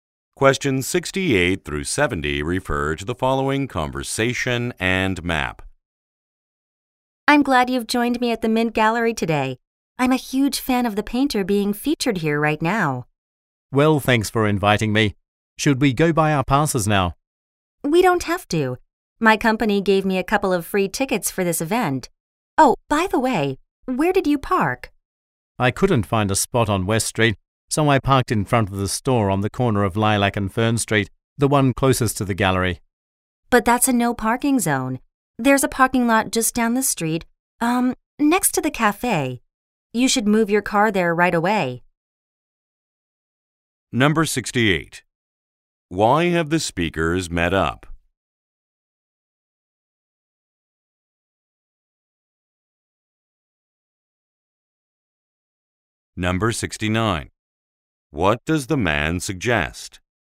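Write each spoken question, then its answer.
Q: Why have the speakers met up?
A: To see a painter's exhibition at the Mint Gallery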